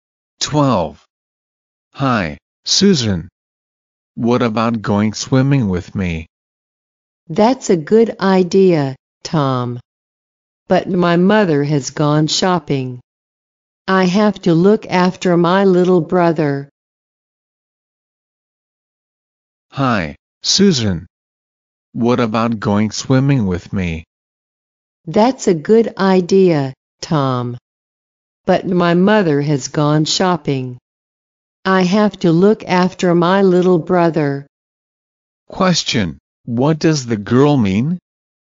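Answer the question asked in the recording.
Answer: She can't go swimming because she has to look after her little brother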